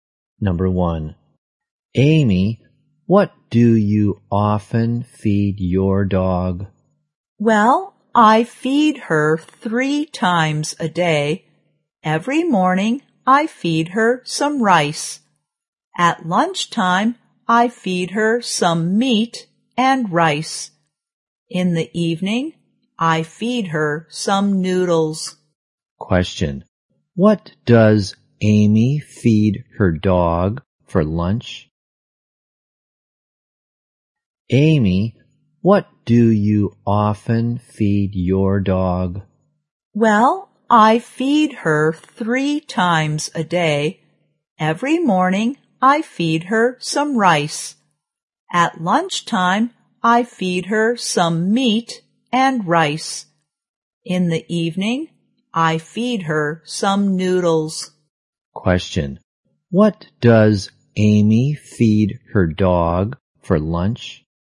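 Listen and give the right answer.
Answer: Some meat and rice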